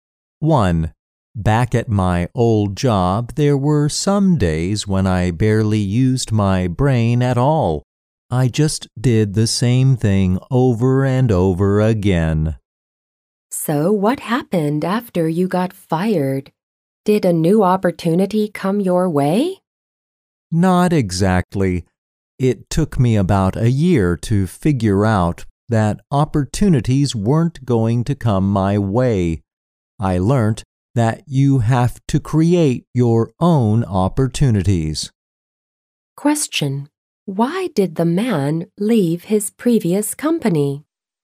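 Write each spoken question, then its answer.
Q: Why did the man leave his previous company?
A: He was fired.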